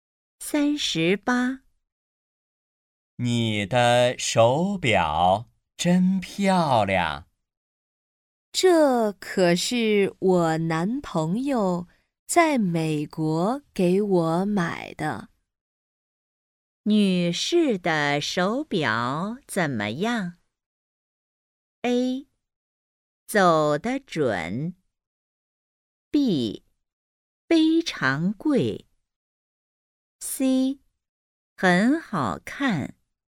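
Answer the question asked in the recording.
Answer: C: 很好看。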